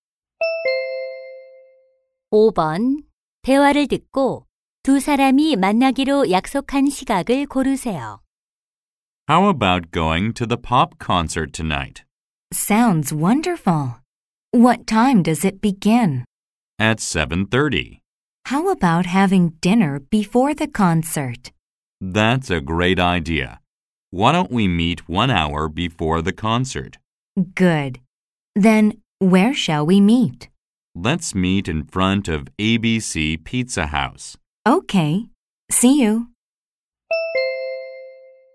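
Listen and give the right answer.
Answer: 6시 30분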